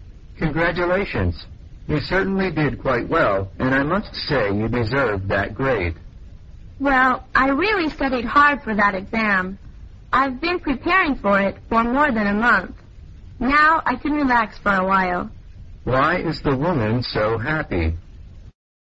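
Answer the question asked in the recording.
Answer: She did well on the exam and got a good grade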